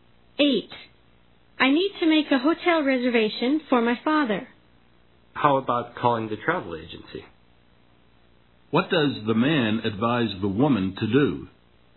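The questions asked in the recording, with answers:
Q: What does the man advise the woman to do?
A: Call the travel agency.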